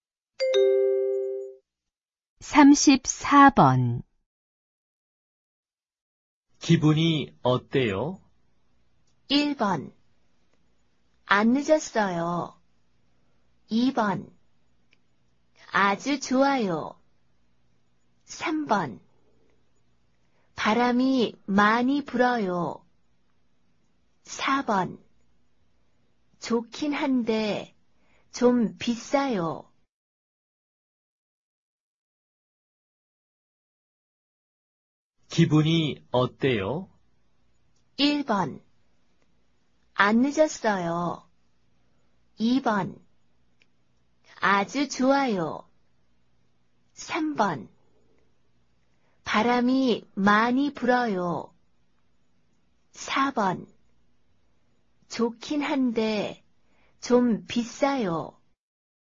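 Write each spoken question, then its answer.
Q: 기분이 어때요?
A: 2: 아주 좋아요.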